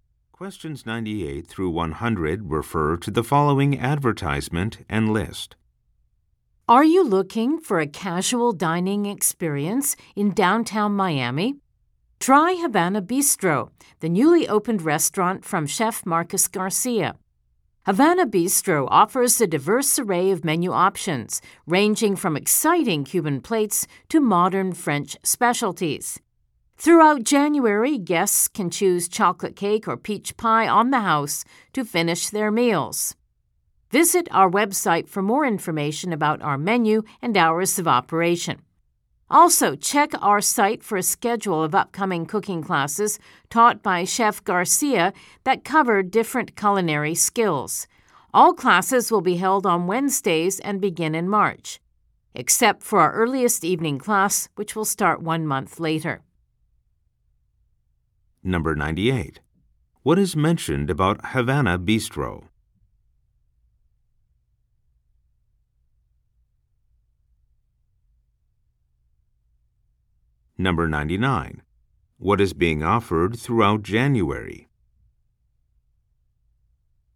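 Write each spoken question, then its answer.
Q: What is mentioned about Havana Bistro?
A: It opened recently

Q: What is being offered throughout January?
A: A free dessert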